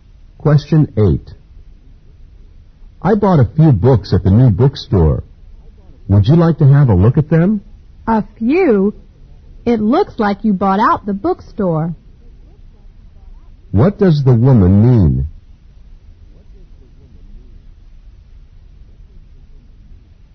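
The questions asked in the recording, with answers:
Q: What does the woman mean?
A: The man bought a lot of books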